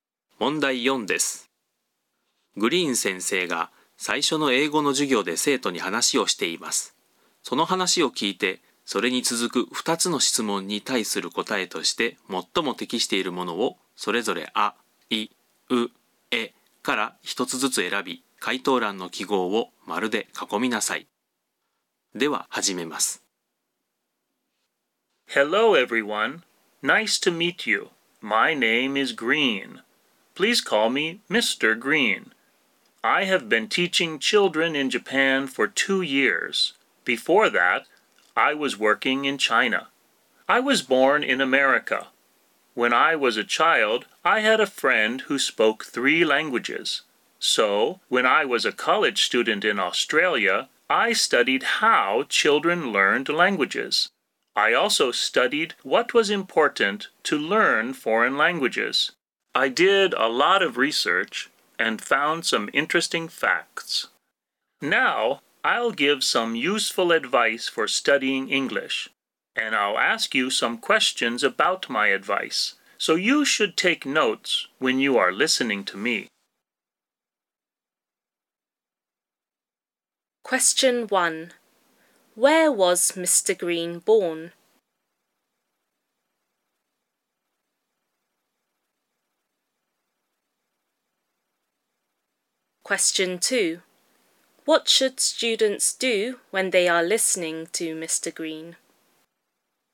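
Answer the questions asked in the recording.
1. In America
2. They should take notes.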